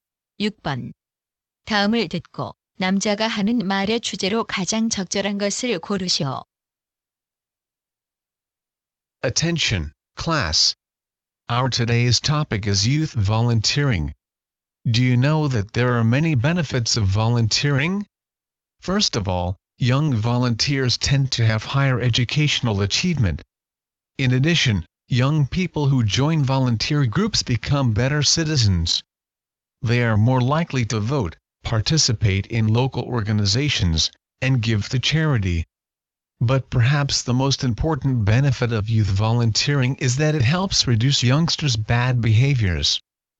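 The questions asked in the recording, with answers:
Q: 다음을 듣고 남자가 하는 말의 주제로 가장 적절한 것을 고르시오.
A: 청소년 자원봉사의 이점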